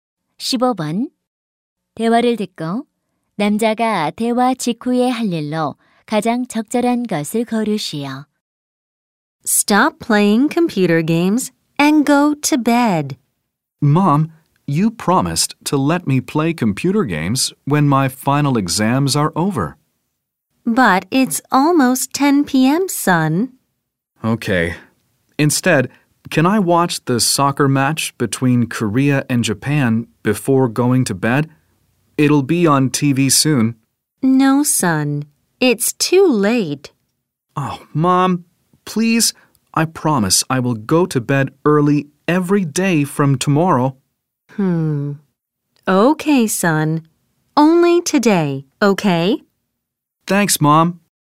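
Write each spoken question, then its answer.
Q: 대화를 듣고 남자가 대화 직후에 할 일로 가장 적절한 것을 고르시오.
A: TV로 한일 축구 경기 보기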